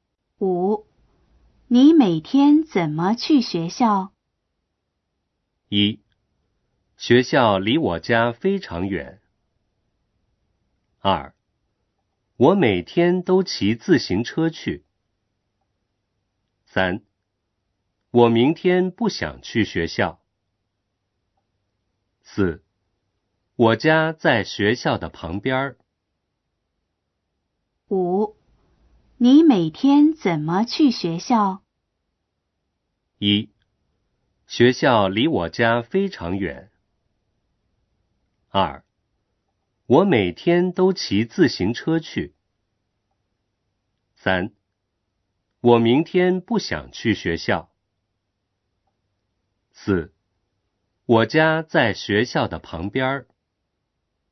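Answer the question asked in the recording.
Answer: 二: 我每天都骑自行车去。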